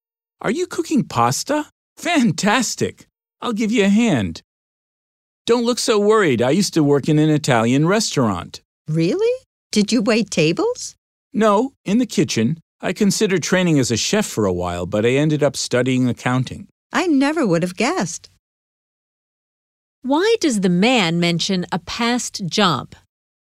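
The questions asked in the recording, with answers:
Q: Why does the man mention a past job?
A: To reassure her that he can cook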